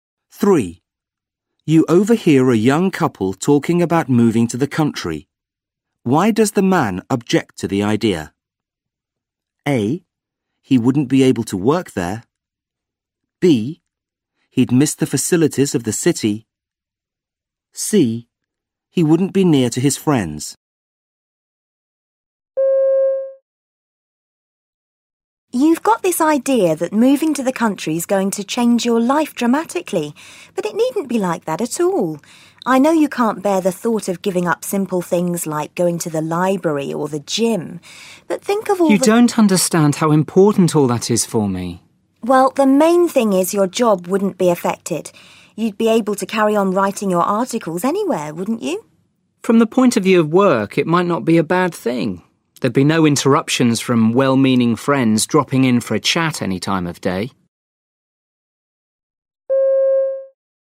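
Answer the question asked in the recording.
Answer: B: He'd miss the facilities of the city.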